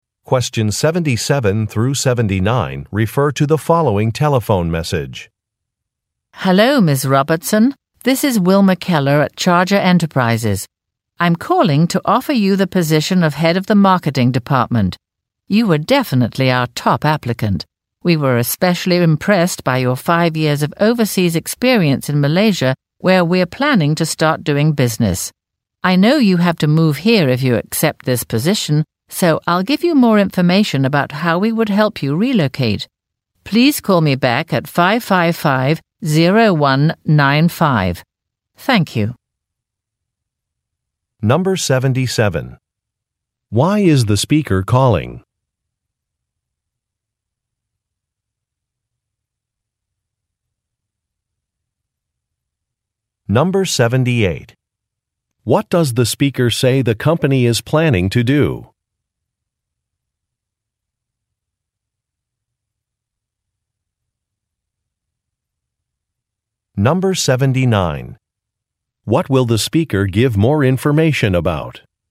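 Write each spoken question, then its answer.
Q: Why is the speaker calling?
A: To offer a job (head of the marketing department)

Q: What does the speaker say the company is planning to do?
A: Start doing business in Malaysia

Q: What will the speaker give more information about?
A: How the company would help her relocate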